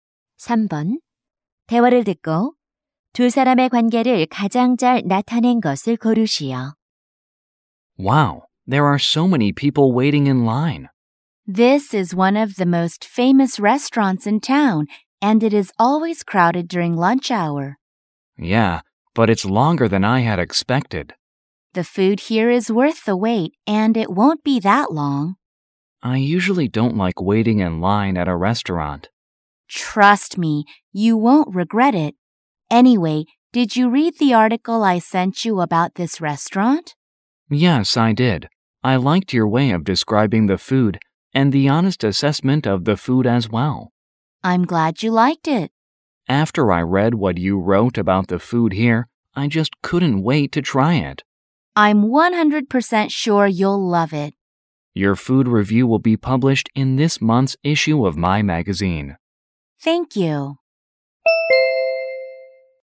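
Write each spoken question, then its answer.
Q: 대화를 듣고 두 사람의 관계를 가장 잘 나타낸 것을 고르시오.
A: 잡지 편집자 - 음식 평론가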